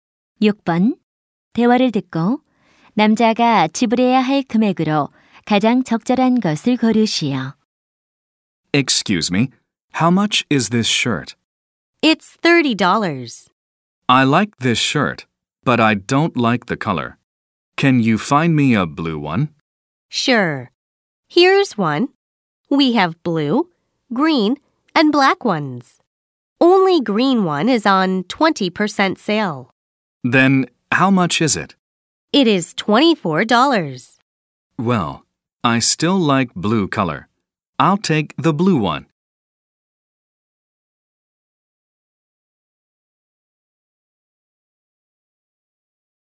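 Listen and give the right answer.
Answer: 30달러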